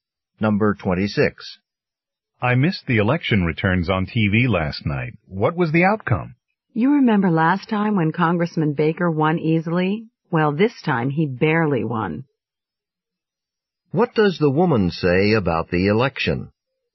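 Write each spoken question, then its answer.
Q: What does the woman say about the election?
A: Congressman Baker won, but only barely.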